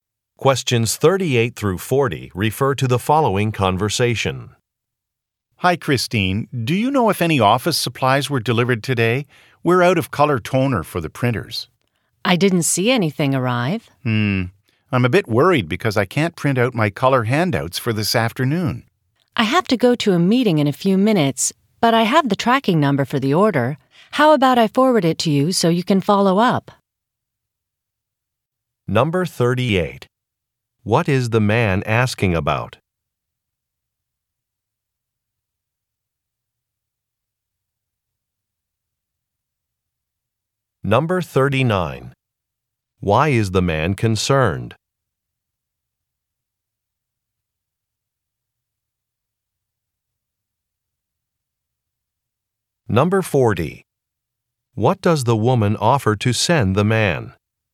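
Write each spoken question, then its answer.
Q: What is the man asking about?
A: An office supply delivery

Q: Why is the man concerned?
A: He can't print his color handouts

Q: What does the woman offer to send the man?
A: A tracking number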